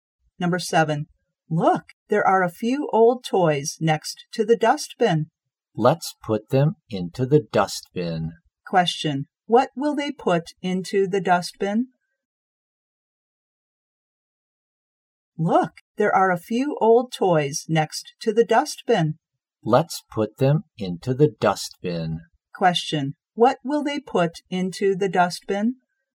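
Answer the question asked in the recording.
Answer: Old toys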